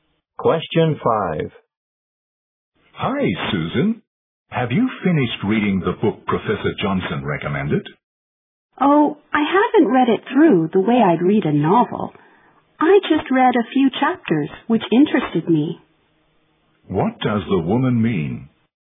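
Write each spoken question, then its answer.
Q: What does the woman mean?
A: She has only read the chapters that interested her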